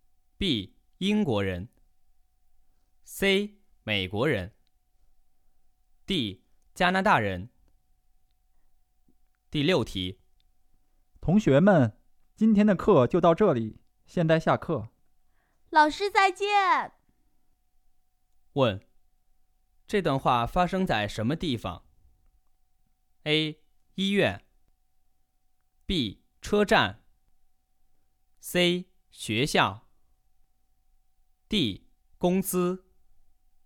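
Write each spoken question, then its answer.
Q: 问,这段话发生在什么地方?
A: C: 学校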